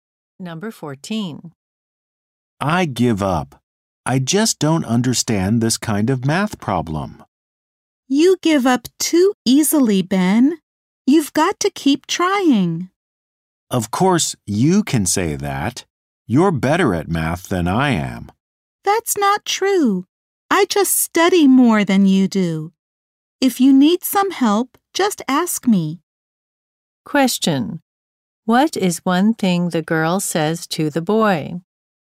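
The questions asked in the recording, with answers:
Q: What is one thing the girl says to the boy?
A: He gives up too easily and should keep trying.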